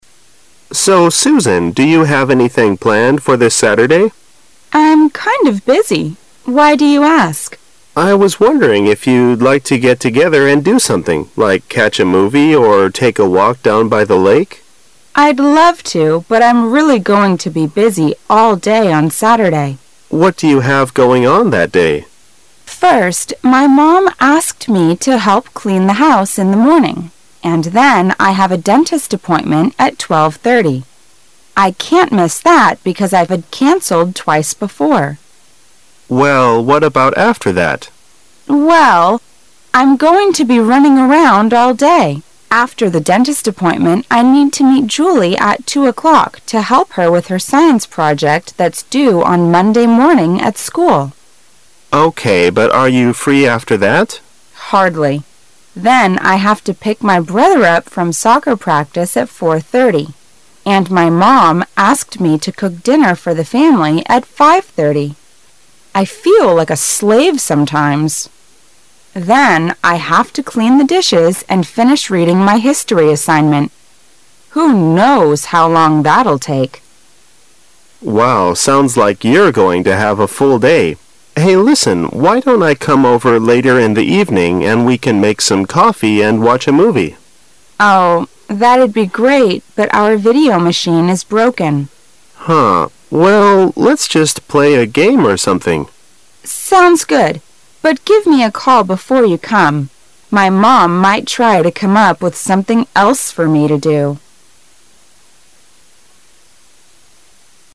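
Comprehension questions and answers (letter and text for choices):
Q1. Why can't the woman miss the dentist appointment?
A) Because she has changed the appointment twice before.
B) Because she is free only at that period of time.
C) Because she has got a toothache all day.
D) Because her dentist will be busy at other periods.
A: A) Because she has changed the appointment twice before.

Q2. What will the woman do with Julie?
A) Watch a movie with Julie.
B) Practice soccer with Julie.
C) Help Julie with her science project.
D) Finish the history assignment together.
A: C) Help Julie with her science project.

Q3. Why can't they watch a movie at home in the evening?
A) Because Susan's mother will not allow them to watch a movie.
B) Because Susan has to finish her history assignment.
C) Because Susan has to cook for the family.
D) Because Susan's video machine is broken.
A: D) Because Susan's video machine is broken.

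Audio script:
A
[解析] 14-16 M: So, Susan, do you have anything planned for this Saturday? W: Uh, I'm kind of busy. Why do you ask? M: Oh, I was wondering if you like to get together and do something, like catch a movie or take a walk down by the lake. W: I'd love to, but I'm really going to be busy all day on Saturday. M: What do you have going on that day? W: First, my mom asked me to help clean the house in the morning, and then I have a dentist appointment at 12:30. I can't miss that because I've canceled twice before. M: Well, what about after that? W: Well, I'm going to be running around all day. After the dentist appointment, I need to meet Julie at 2:00 to help her with her science project that's due on Monday morning at school. M: Okay, but are you free 'after that? W: Hardly. Then I have to pick my brother up from soccer practice at 4:30, and my mom asked me to cook dinner for the family at 5: 30. 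I feel like a slave sometimes. Then, I have to clean the dishes and finish reading my history assignment. Who knows how long that'll take. M: Wow, sounds like you're going to have a full day. Hey listen, why don't I come over later in the evening, and we can make some coffee and watch a movie. W: Oh, that'd be great, but our video machine is broken. M: Huh. Well, let's just play a game or something. W: Sounds good, but give me a call before you come. My mom might try to come up with something else for me to do.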